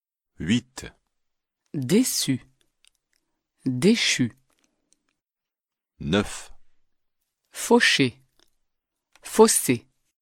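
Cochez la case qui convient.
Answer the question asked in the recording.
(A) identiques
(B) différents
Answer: (B) différents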